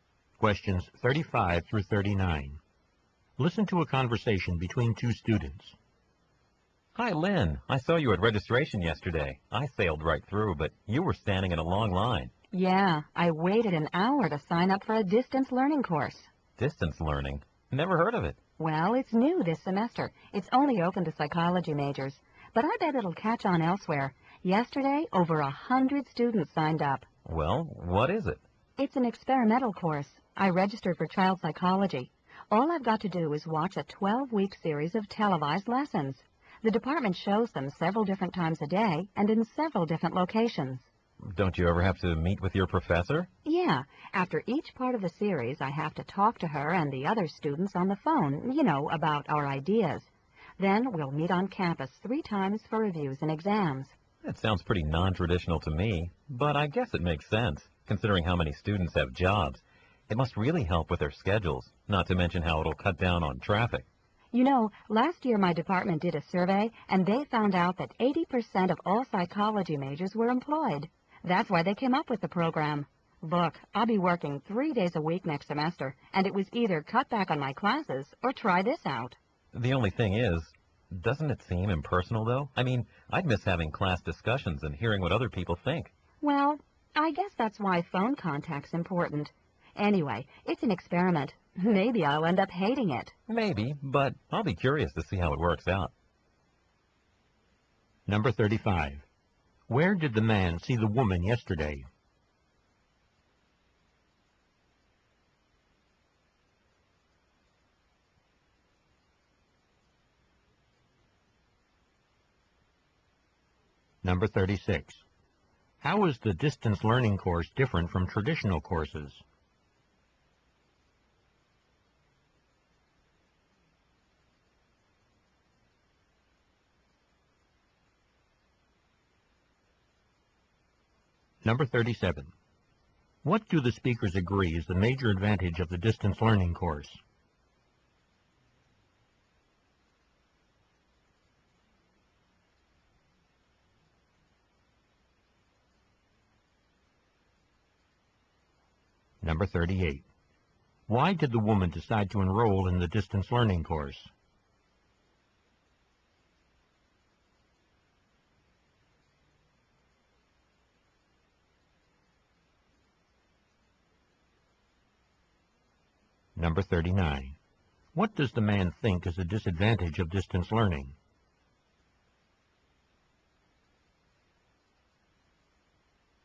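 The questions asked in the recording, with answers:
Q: Where did the man see the woman yesterday?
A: At registration, standing in a long line

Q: How is the distance learning course different from traditional courses?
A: Students watch televised lessons and discuss by phone, meeting on campus only three times

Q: What do the speakers agree is the major advantage of the distance learning course?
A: It helps students with jobs fit classes into their schedules

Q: Why did the woman decide to enroll in the distance learning course?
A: She'll be working three days a week next semester

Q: What does the man think is a disadvantage of distance learning?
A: It seems impersonal; no class discussions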